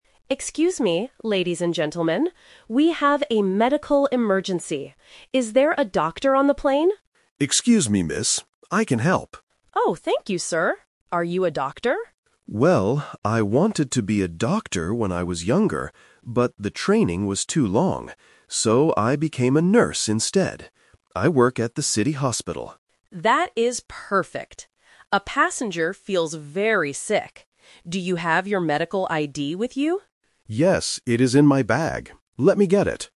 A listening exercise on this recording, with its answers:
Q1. Who is the flight attendant looking for at first?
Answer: A doctor

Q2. What is David's job?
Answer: He is a nurse.

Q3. Why didn't David become a doctor?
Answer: The training was too long.

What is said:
Flight Attendant: Excuse me, ladies and gentlemen. We have a medical emergency. Is there a doctor on the plane?
David: Excuse me, miss. I can help.
Flight Attendant: Oh, thank you, sir. Are you a doctor?
David: Well, I wanted to be a doctor when I was younger, but the training was too long. So, I became a nurse instead. I work at the city hospital.
Flight Attendant: That is perfect. A passenger feels very sick. Do you have your medical ID with you?